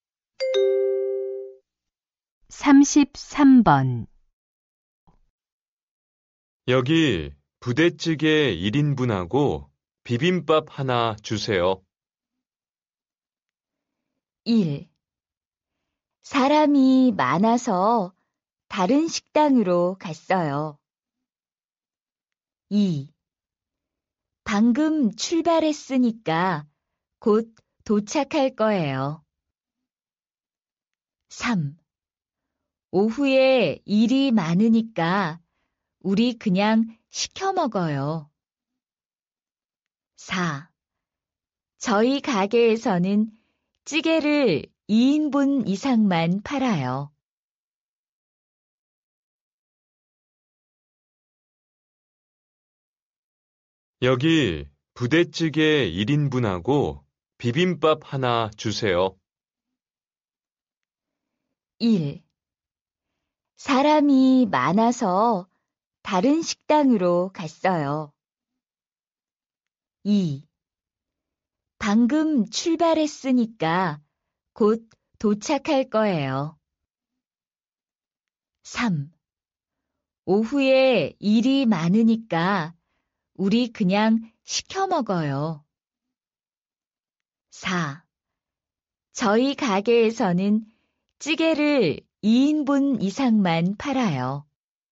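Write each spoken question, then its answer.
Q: 여기 부대찌개 1인분하고 비빔밥 하나 주세요.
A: 4: 저희 가게에서는 찌개를 2인분 이상만 팔아요.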